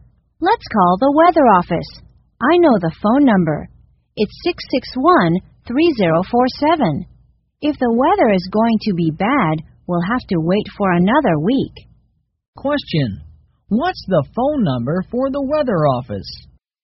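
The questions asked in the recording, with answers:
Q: What's the phone number for the weather office?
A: 661-3047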